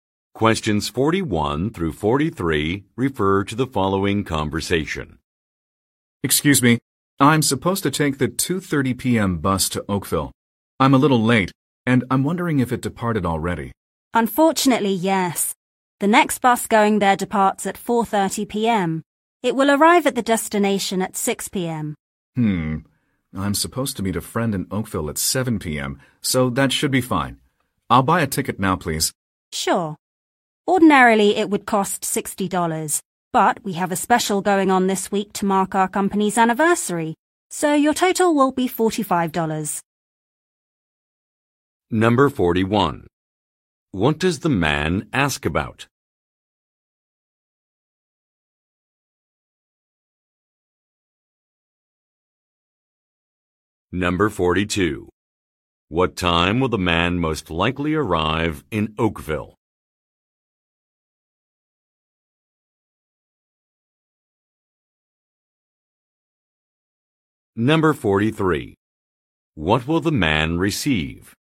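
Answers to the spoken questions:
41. Whether the 2:30 p.m. bus to Oakville has already left
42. 6 p.m.
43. A discount on his ticket ($45 instead of $60)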